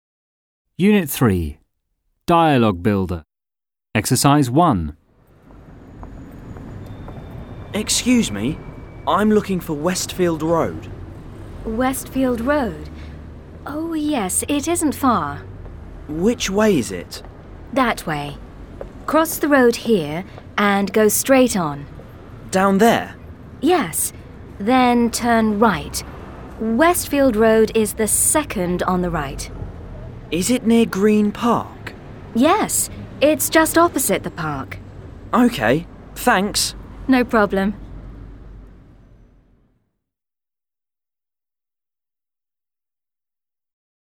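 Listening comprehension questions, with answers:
Ex.1 p41 (Student's book).Read and listen. Are these sentences true or false? (write)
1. Westfield Road is quite far .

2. Dan needs to turn left.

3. Westfield Road is opposite Green Park.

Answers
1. False
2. False
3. True

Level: 7 "А", " Б", "Г", "Д ", "Ж"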